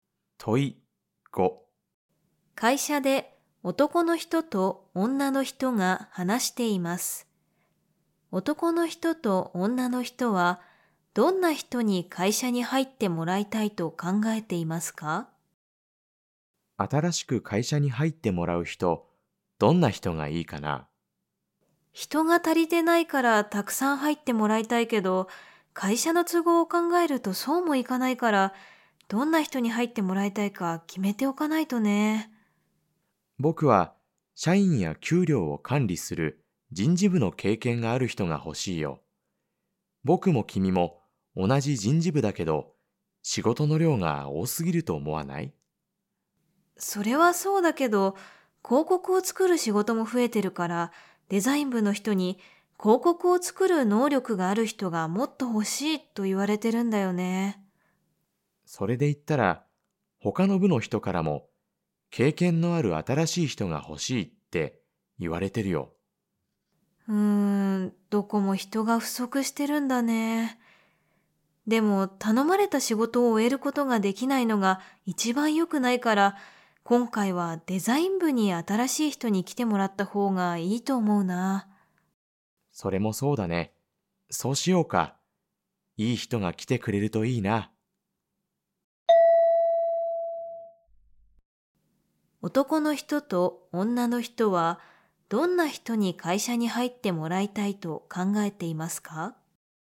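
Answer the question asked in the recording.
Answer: デザイン部で広告を作る能力がある人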